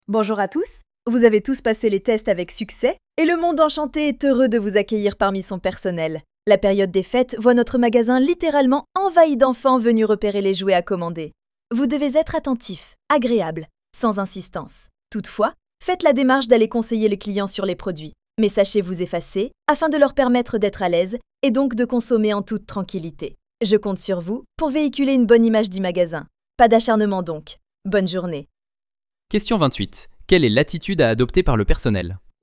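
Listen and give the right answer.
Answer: Conseiller les clients avec attention et amabilité, sans insister.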